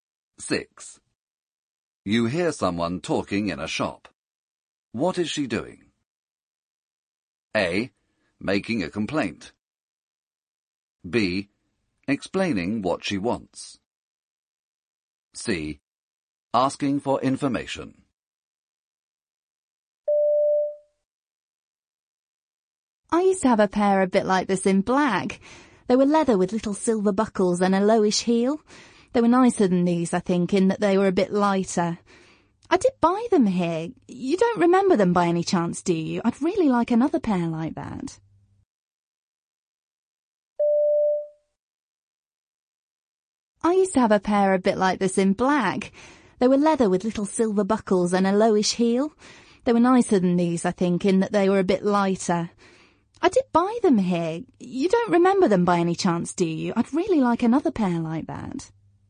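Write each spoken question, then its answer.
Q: What is she doing?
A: B: Explaining what she wants.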